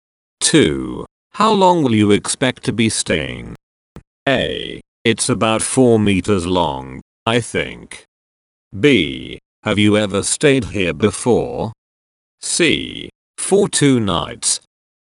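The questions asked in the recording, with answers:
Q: How long will you expect to be staying?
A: C: For 2 nights.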